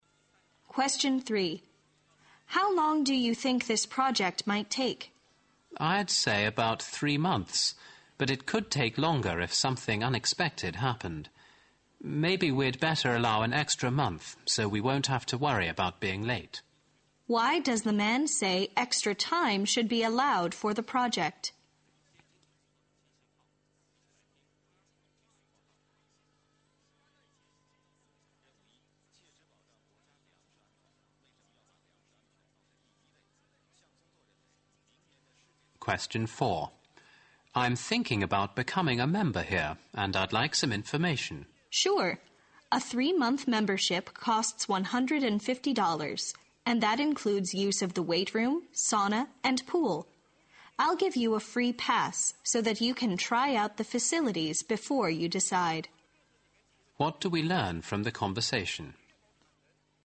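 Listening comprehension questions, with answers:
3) Q: Why does the man say extra time should be allowed for the project?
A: In case some problem should occur.

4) Q: What do we learn from the conversation?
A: The man can try out the facilities before he becomes a member.

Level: 六级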